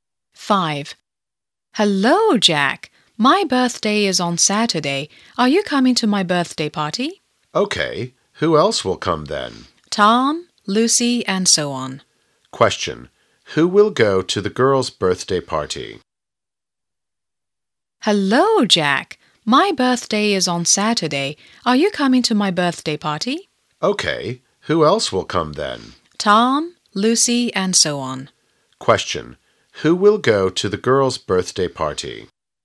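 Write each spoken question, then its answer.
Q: Who will go to the girl's birthday party?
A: Jack, Tom, Lucy and others.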